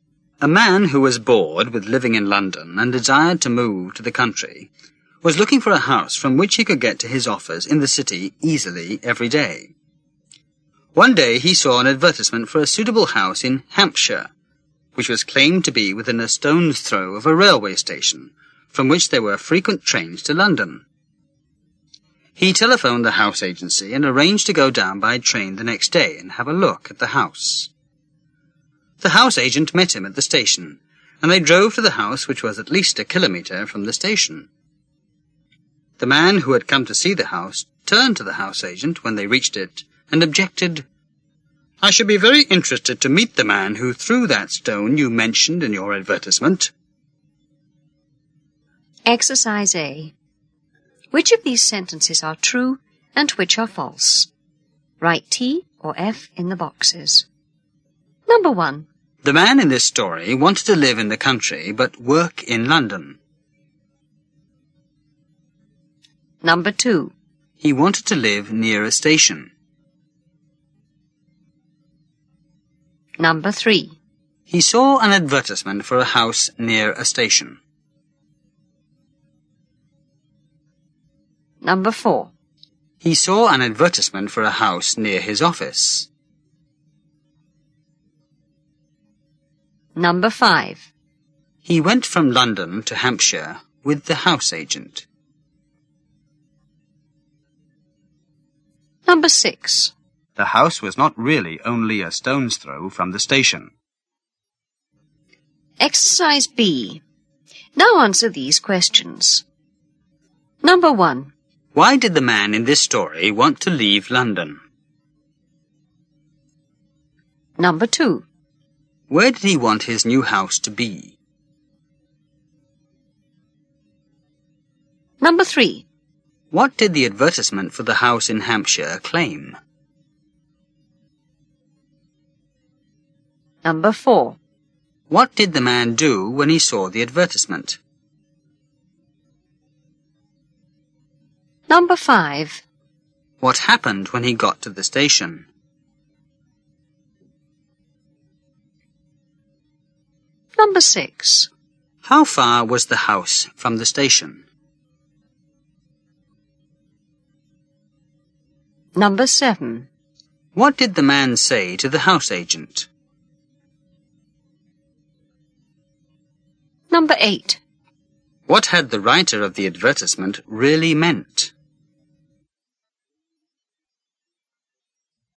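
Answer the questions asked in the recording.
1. True
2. True
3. True
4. False
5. False
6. True
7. He was bored with living in London
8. In the country, where he could get to his office in the city easily
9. That it was within a stone's throw of a railway station with frequent trains to London
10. He telephoned the house agency and arranged to go and see the house the next day
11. The house agent met him and they drove to the house
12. At least a kilometre
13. That he would be very interested to meet the man who threw the stone mentioned in the advertisement
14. That the house was very close to the station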